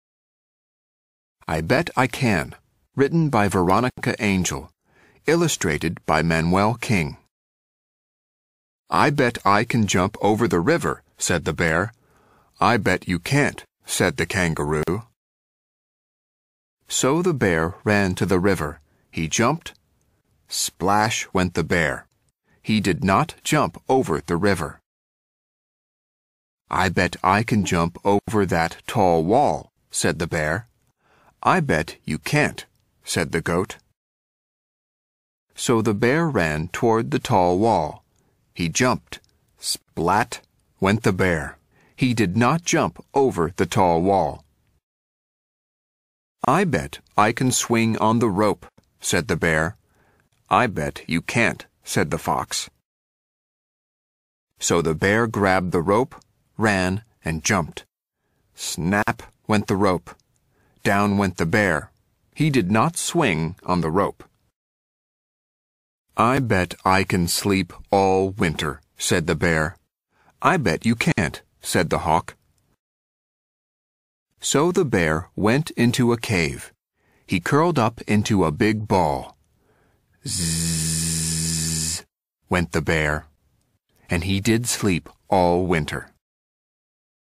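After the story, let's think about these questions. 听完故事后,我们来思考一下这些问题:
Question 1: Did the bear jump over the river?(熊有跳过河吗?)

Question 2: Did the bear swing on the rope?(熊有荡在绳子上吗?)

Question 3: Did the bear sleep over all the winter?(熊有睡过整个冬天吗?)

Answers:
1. No, he did not.
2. No, the rope snapped.
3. Yes, he did.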